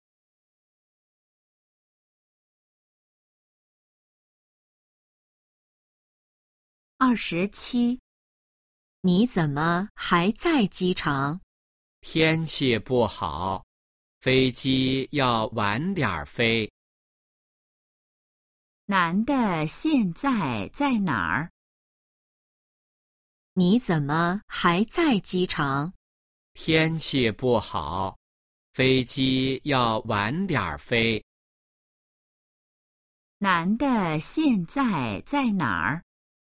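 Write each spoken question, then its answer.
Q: 男的现在在哪儿?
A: 机场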